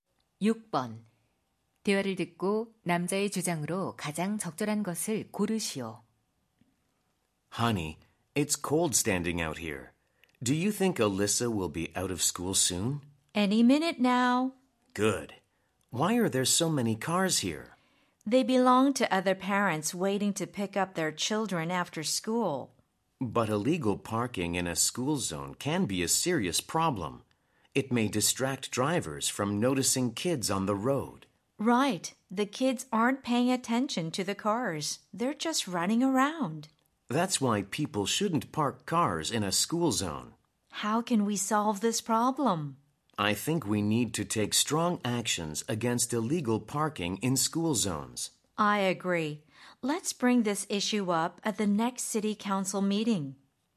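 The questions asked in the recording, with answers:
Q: 대화를 듣고 남자의 주장으로 가장 적절한 것을 고르시오.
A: 스쿨존 불법 주차에 강력히 대응해야 한다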